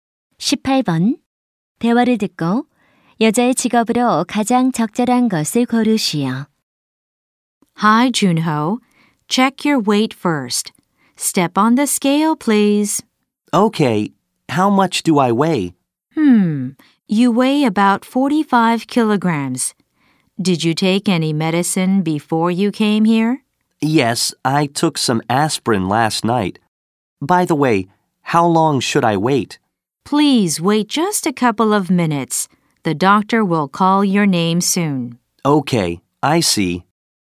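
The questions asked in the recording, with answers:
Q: 대화를 듣고 여자의 직업으로 가장 적절한 것을 고르시오.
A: 간호사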